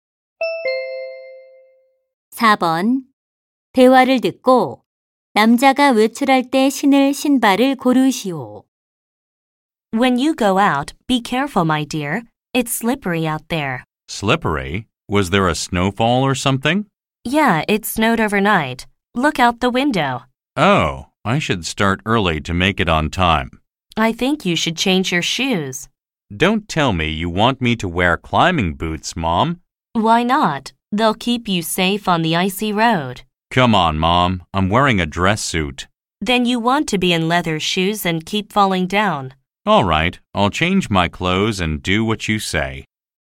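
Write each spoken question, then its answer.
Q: 대화를 듣고 남자가 외출할 때 신을 신발을 고르시오.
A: 등산화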